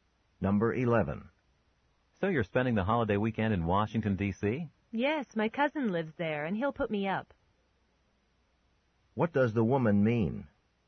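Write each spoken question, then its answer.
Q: What does the woman mean?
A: She will stay with her cousin.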